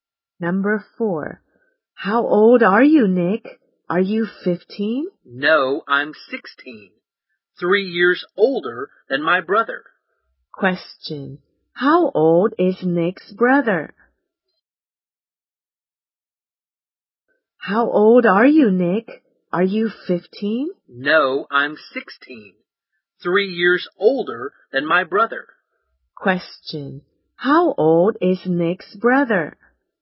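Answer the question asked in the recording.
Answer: 13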